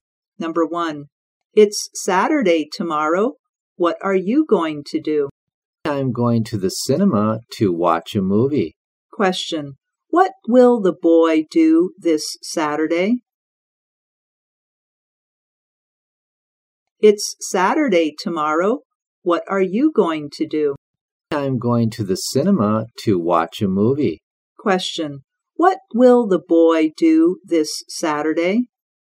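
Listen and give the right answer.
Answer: Go to the cinema to watch a movie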